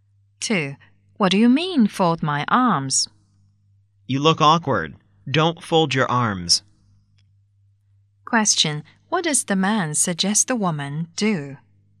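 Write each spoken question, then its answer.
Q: What does the man suggest the woman do?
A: Not fold her arms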